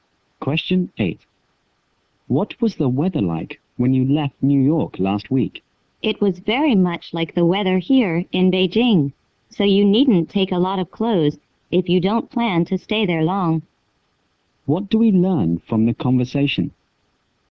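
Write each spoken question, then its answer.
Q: What do we learn from the conversation?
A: The weather in New York is much like the weather in Beijing.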